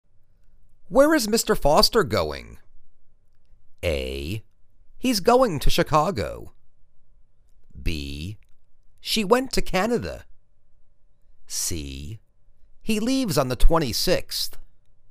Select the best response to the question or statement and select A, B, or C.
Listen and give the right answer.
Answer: He's going to Chicago.